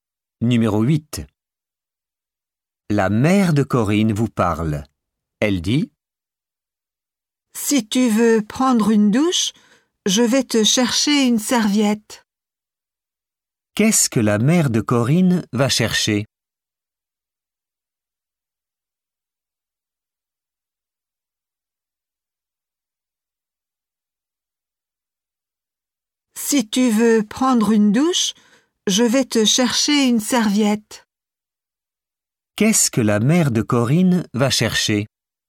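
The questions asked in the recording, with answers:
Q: Qu'est-ce que la mère de Corinne va chercher?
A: Une serviette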